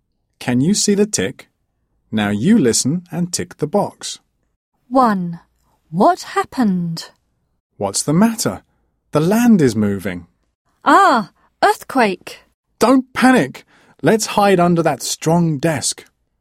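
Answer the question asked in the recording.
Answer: An earthquake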